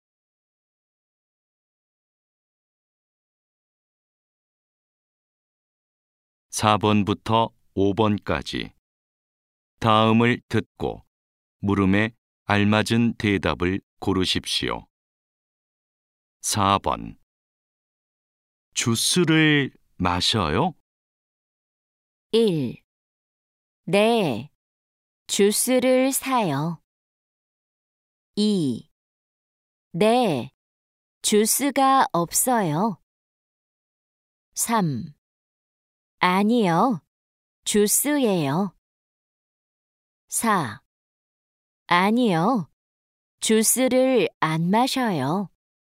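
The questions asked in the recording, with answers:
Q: 주스를 마셔요?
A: 4: 아니요, 주스를 안 마셔요.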